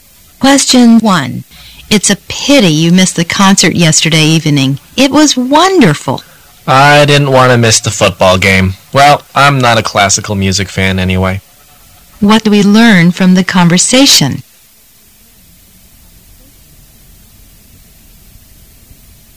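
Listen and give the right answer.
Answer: The man skipped the concert to watch the football game.

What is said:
[解析] W: It's a pity you missed the concert yesterday evening. It was wonderful! M: I didn't want to miss the football game. Well, I'm not a classical music fan anyway. Q: What do we learn from the conversation?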